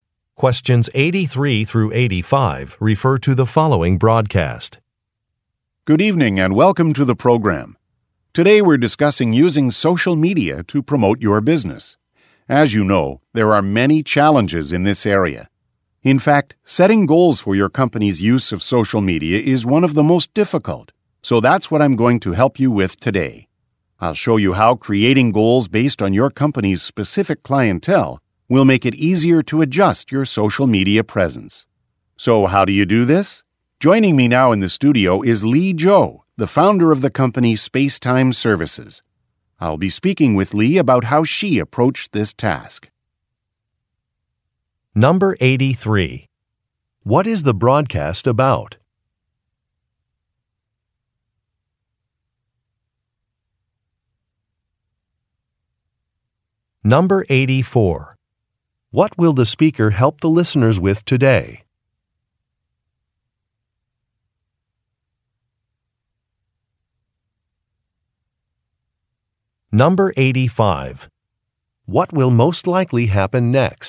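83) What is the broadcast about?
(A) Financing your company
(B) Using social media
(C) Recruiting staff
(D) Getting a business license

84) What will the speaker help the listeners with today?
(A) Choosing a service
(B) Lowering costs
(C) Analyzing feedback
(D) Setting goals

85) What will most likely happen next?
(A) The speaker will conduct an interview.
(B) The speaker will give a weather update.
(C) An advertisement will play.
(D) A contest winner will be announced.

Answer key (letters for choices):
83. B
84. D
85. A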